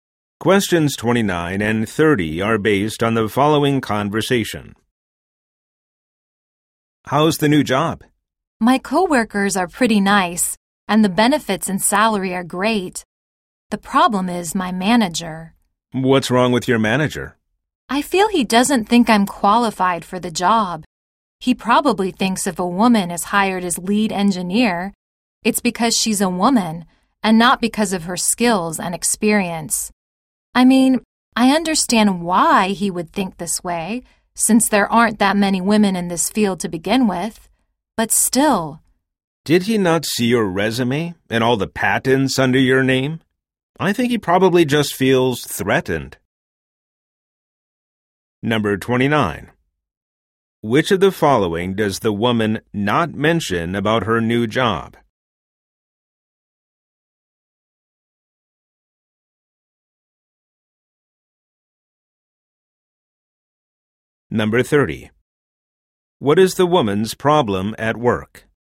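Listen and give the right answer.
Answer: Her manager doesn't think she's qualified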